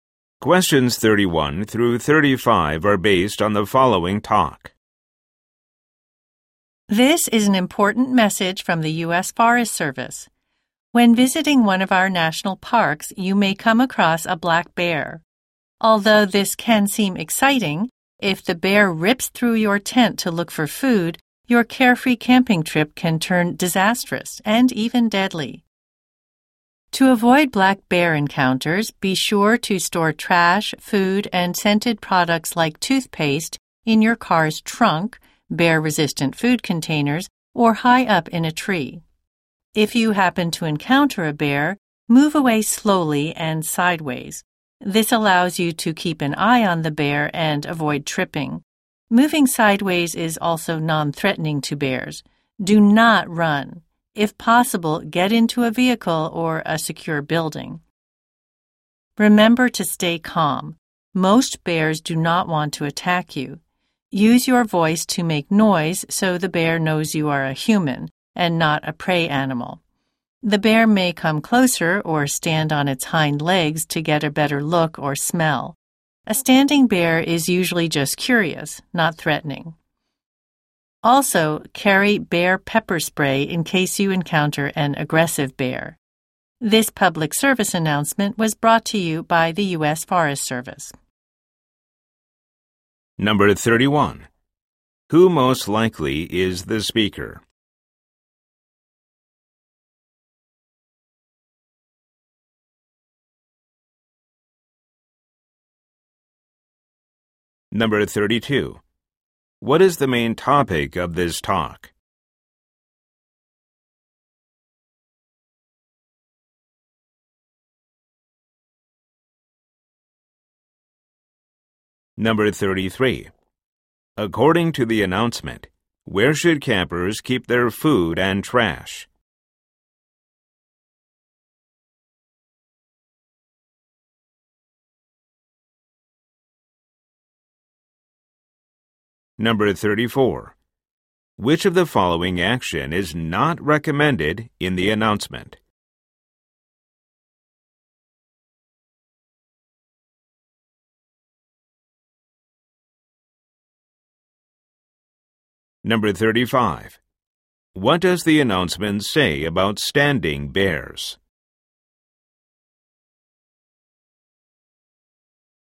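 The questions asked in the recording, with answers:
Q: Who most likely is the speaker?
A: Someone from the U.S. Forest Service

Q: What is the main topic of this talk?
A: How to avoid and deal with black bear encounters

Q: According to the announcement, where should campers keep their food and trash?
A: In the car trunk, bear-resistant containers, or high up in a tree

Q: What does the announcement say about standing bears?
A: They are usually just curious, not threatening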